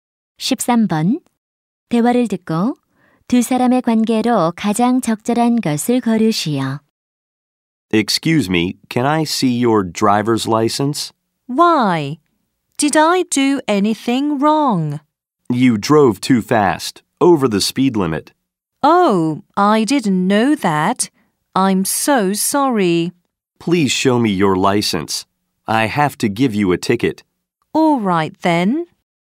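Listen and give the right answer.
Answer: 경찰관 - 운전자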